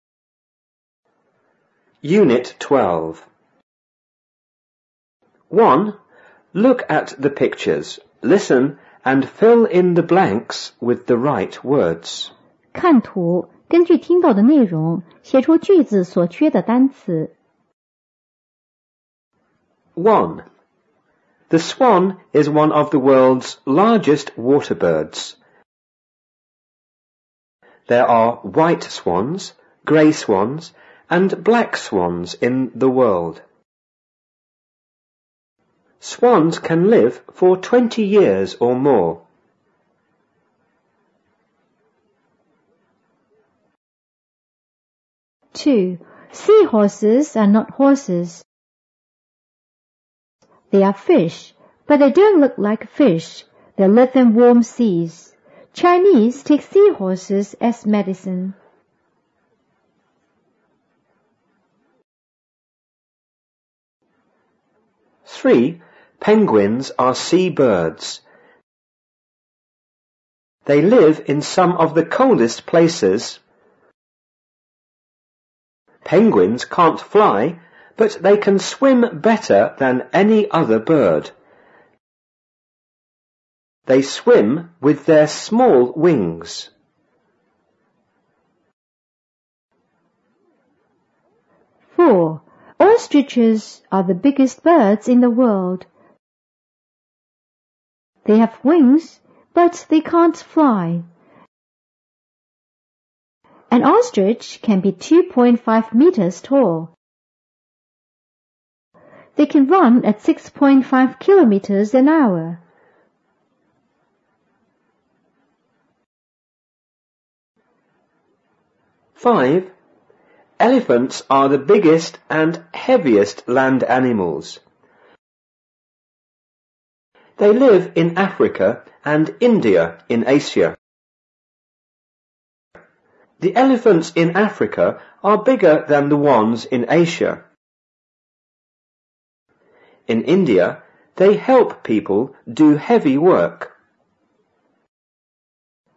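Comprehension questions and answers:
Look at the pictures.Listen and fill in the blanks with the right words.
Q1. A swan is one of the world's____ ____birds.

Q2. There are thite swans,grey swans and____black swans in the____.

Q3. Swans can live for 20____or more.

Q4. Seahorse are____horses.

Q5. They are fish,but they____in____seas.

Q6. Chinese take dry seahorse as_____.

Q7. Penguins are_____birds.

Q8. They____in some of the____places.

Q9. Penguins_____fly,but they can____better than any other birds.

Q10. Ostrich are the____birds in the world.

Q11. They have wings,but they can't____.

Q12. An ostrich can be 2.5____tall.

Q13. They can_____at 6.5 kilometres each____.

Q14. Elephants are the____and____land animals.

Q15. They____in A frica and India in Asia.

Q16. In India they_____people do heavy work.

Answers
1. largest water
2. world
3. years
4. not
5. live; warm
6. medicine
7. 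sea
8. live; coldest
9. can't; swim
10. biggest
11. fly
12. metres
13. run; hour
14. biggest; heaviest
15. live
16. help

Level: 五年级下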